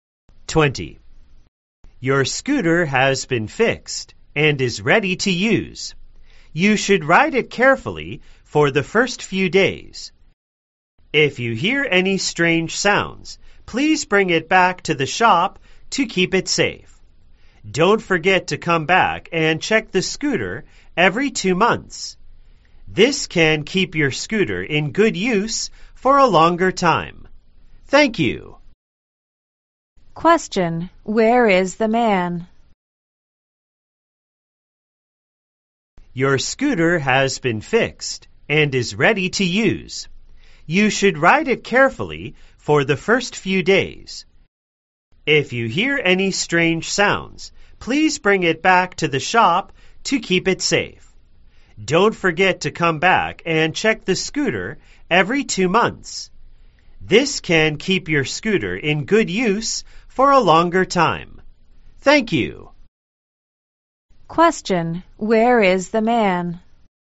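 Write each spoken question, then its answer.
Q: Where is the man?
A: At a scooter repair shop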